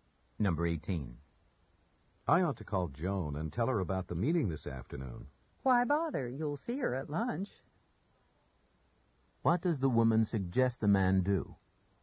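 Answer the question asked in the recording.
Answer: Tell Joan at lunch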